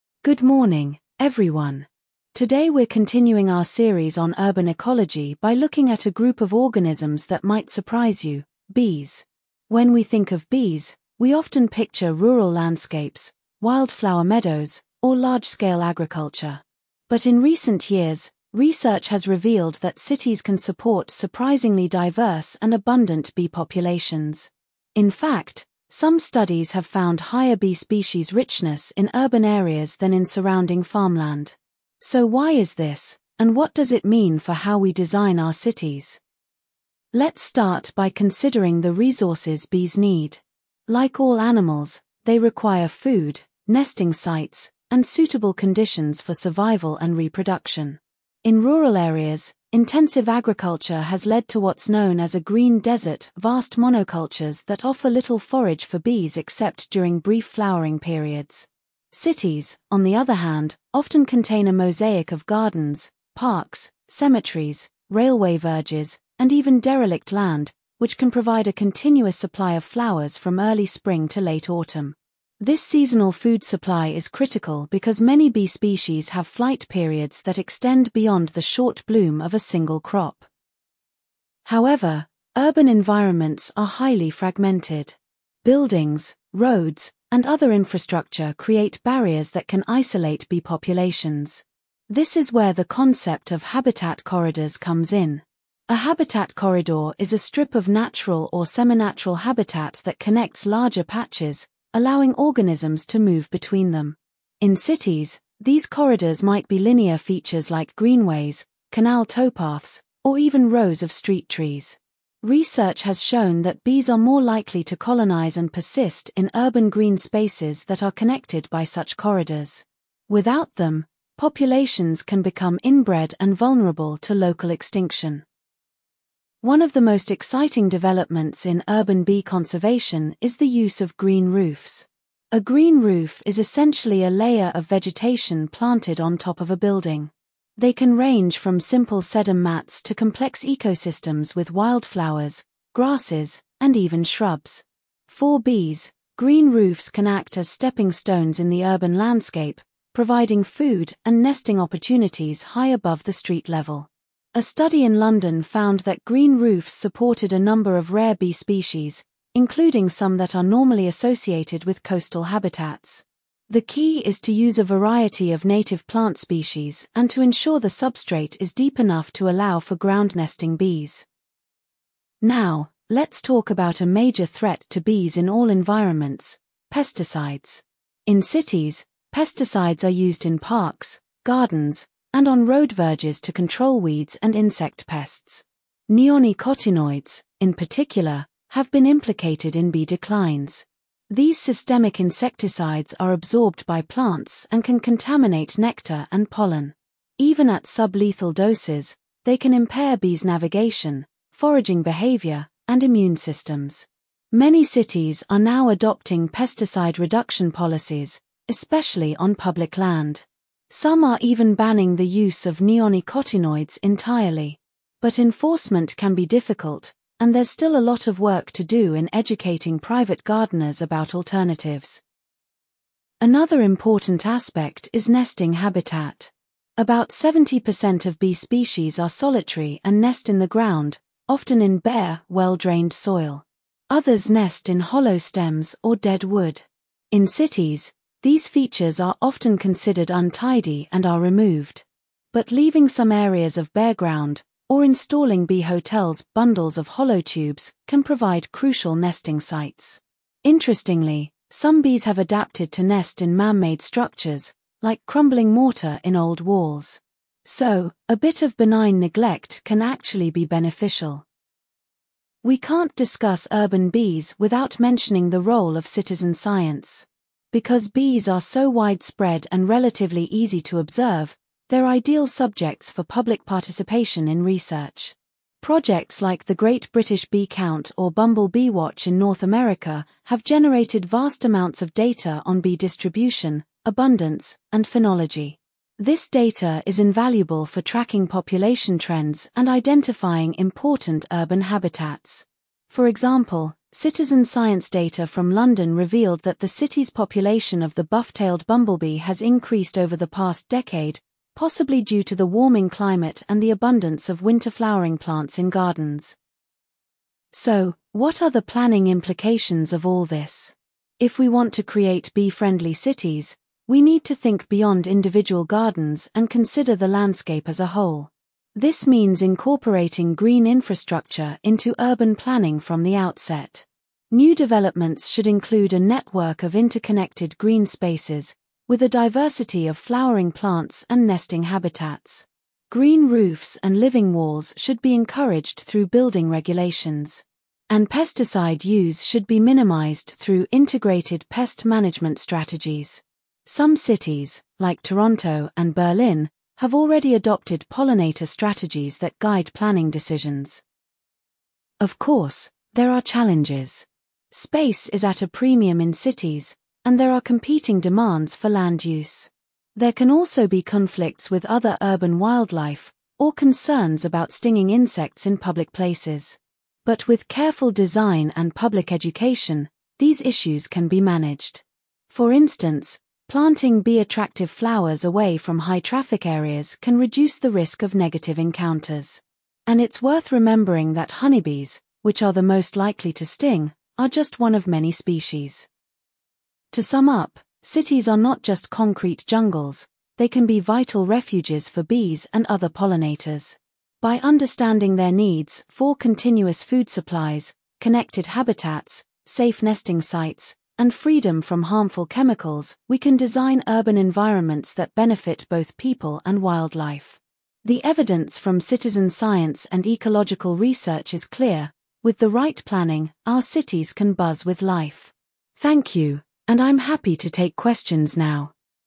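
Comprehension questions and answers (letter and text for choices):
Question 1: Complete the note: The lecturer compares intensive farmland to a ______.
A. green desert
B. flower meadow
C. wild habitat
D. urban garden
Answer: A. green desert

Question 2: Complete the note: Cities can provide a ______ of flowers from early spring to late autumn.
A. limited variety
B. continuous supply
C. brief display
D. single species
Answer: B. continuous supply

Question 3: What are habitat corridors in cities?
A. Underground tunnels for wildlife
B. Linear features like greenways and canal towpaths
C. Large parks with diverse plants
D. Rooftop gardens on tall buildings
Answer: B. Linear features like greenways and canal towpaths

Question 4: Complete the table: Green roofs can act as ______ in the urban landscape.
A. nesting boxes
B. stepping stones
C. food warehouses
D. water sources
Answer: B. stepping stones

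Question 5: What is a key requirement for green roofs to support ground-nesting bees?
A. Shallow soil with sedum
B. Deep enough substrate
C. Frequent watering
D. Shade from buildings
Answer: B. Deep enough substrate

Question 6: What effect do neonicotinoids have on bees at sub-lethal doses?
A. They cause immediate death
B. They improve foraging efficiency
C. They impair navigation and immune systems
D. They increase reproduction rates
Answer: C. They impair navigation and immune systems

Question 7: What percentage of bee species are solitary and nest in the ground?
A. About 30%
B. About 50%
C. About 70%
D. About 90%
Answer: C. About 70%

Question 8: Why does the lecturer mention the 'Great British Bee Count'?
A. To illustrate a government monitoring program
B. To give an example of citizen science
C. To explain a decline in bee populations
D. To describe a new pesticide policy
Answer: B. 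To give an example of citizen science

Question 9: What does the lecturer suggest about planting bee-attractive flowers?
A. Plant them only on green roofs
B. Avoid them in all public areas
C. Place them away from high-traffic areas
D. Use only native species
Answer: C. Place them away from high-traffic areas

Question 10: Which city is NOT mentioned as having adopted a pollinator strategy?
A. Toronto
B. Berlin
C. London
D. Both Toronto and Berlin are mentioned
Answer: C. London

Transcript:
Good morning, everyone. Today we're continuing our series on urban ecology by looking at a group of organisms that might surprise you: bees. When we think of bees, we often picture rural landscapes, wildflower meadows, or large-scale agriculture. But in recent years, research has revealed that cities can support surprisingly diverse and abundant bee populations. In fact, some studies have found higher bee species richness in urban areas than in surrounding farmland. 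So why is this, and what does it mean for how we design our cities?
Let's start by considering the resources bees need. Like all animals, they require food, nesting sites, and suitable conditions for survival and reproduction. In rural areas, intensive agriculture has led to what's known as a 'green desert' - vast monocultures that offer little forage for bees except during brief flowering periods. Cities, on the other hand, often contain a mosaic of gardens, parks, cemeteries, railway verges, and even derelict land, which can provide a continuous supply of flowers from early spring to late autumn. This seasonal food supply is critical because many bee species have flight periods that extend beyond the short bloom of a single crop.
However, urban environments are highly fragmented. Buildings, roads, and other infrastructure create barriers that can isolate bee populations. This is where the concept of habitat corridors comes in. 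A habitat corridor is a strip of natural or semi-natural habitat that connects larger patches, allowing organisms to move between them. In cities, these corridors might be linear features like greenways, canal towpaths, or even rows of street trees. Research has shown that bees are more likely to colonise and persist in urban green spaces that are connected by such corridors. Without them, populations can become inbred and vulnerable to local extinction.
One of the most exciting developments in urban bee conservation is the use of green roofs. A green roof is essentially a layer of vegetation planted on top of a building. They can range from simple sedum mats to complex ecosystems with wildflowers, grasses, and even shrubs. For bees, green roofs can act as 'stepping stones' in the urban landscape, providing food and nesting opportunities high above the street level. A study in London found that green roofs supported a number of rare bee species, including some that are normally associated with coastal habitats. 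The key is to use a variety of native plant species and to ensure the substrate is deep enough to allow for ground-nesting bees.
Now, let's talk about a major threat to bees in all environments: pesticides. In cities, pesticides are used in parks, gardens, and on road verges to control weeds and insect pests. Neonicotinoids, in particular, have been implicated in bee declines. These systemic insecticides are absorbed by plants and can contaminate nectar and pollen. Even at sub-lethal doses, they can impair bees' navigation, foraging behaviour, and immune systems. Many cities are now adopting pesticide reduction policies, especially on public land. Some are even banning the use of neonicotinoids entirely. But enforcement can be difficult, and there's still a lot of work to do in educating private gardeners about alternatives.
Another important aspect is nesting habitat. About 70% of bee species are solitary and nest in the ground, often in bare, well-drained soil. 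Others nest in hollow stems or dead wood. In cities, these features are often considered untidy and are removed. But leaving some areas of bare ground, or installing 'bee hotels' - bundles of hollow tubes - can provide crucial nesting sites. Interestingly, some bees have adapted to nest in man-made structures, like crumbling mortar in old walls. So, a bit of benign neglect can actually be beneficial.
We can't discuss urban bees without mentioning the role of citizen science. Because bees are so widespread and relatively easy to observe, they're ideal subjects for public participation in research. Projects like the 'Great British Bee Count' or 'Bumble Bee Watch' in North America have generated vast amounts of data on bee distribution, abundance, and phenology. This data is invaluable for tracking population trends and identifying important urban habitats. For example, citizen science data from London revealed that the city's population of the buff-tailed bumblebee has increased over the past decade, possibly due to the warming climate and the abundance of winter-flowering plants in gardens.
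So, what are the planning implications of all this? If we want to create bee-friendly cities, we need to think beyond individual gardens and consider the landscape as a whole. This means incorporating green infrastructure into urban planning from the outset. New developments should include a network of interconnected green spaces, with a diversity of flowering plants and nesting habitats. Green roofs and living walls should be encouraged through building regulations. And pesticide use should be minimised through integrated pest management strategies. Some cities, like Toronto and Berlin, have already adopted pollinator strategies that guide planning decisions.
Of course, there are challenges. Space is at a premium in cities, and there are competing demands for land use. There can also be conflicts with other urban wildlife, or concerns about stinging insects in public places. But with careful design and public education, these issues can be managed. 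For instance, planting bee-attractive flowers away from high-traffic areas can reduce the risk of negative encounters. And it's worth remembering that honeybees, which are the most likely to sting, are just one of many species. Most urban bees are solitary and non-aggressive.
To sum up, cities are not just concrete jungles; they can be vital refuges for bees and other pollinators. By understanding their needs - for continuous food supplies, connected habitats, safe nesting sites, and freedom from harmful chemicals - we can design urban environments that benefit both people and wildlife. The evidence from citizen science and ecological research is clear: with the right planning, our cities can buzz with life. Thank you, and I'm happy to take questions now.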